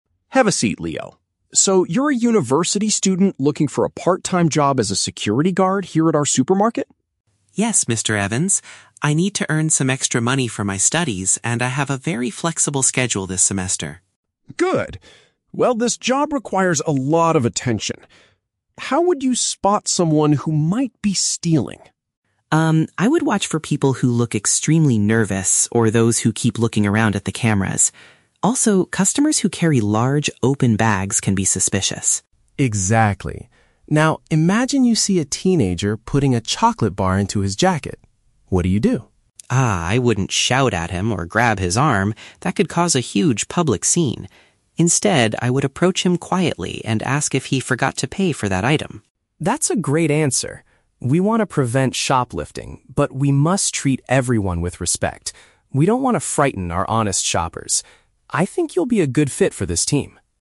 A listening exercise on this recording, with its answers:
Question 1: What is the main reason Leo wants to get this job?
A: To pay for his university education.

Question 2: What kind of behavior does Leo consider suspicious?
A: Customers who frequently check where the cameras are.

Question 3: How would Leo react if he caught someone taking an item without paying?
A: He would speak to them calmly about the unpaid product.

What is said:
Evans: Have a seat, Leo. So, you're a university student looking for a part-time job as a security guard here at our supermarket?
Leo: Yes, Mr. Evans. I need to earn some extra money for my studies, and I have a very flexible schedule this semester.
Mr. Evans: Good. Well, this job requires a lot of attention. How would you spot someone who might be stealing?
Leo: Um, I would watch for people who look extremely nervous, or those who keep looking around at the cameras. Also, customers who carry large, open bags can be suspicious.
Mr. Evans: Exactly. Now, imagine you see a teenager putting a chocolate bar into his jacket. What do you do?
Leo: Ah, I wouldn't shout at him or grab his arm. That could cause a huge public scene. Instead, I would approach him quietly and ask if he forgot to pay for that item.
Mr. Evans: That's a great answer. We want to prevent shoplifting, but we must treat everyone with respect. We don't want to frighten our honest shoppers. I think you'll be a good fit for this team.